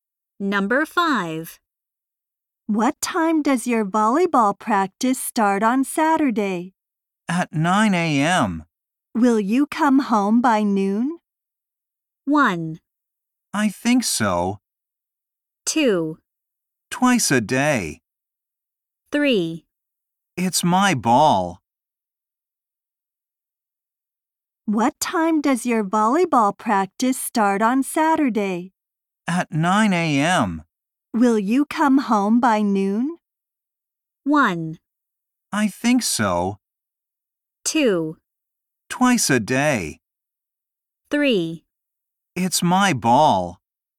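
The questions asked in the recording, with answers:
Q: Will you come home by noon?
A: 1: I think so.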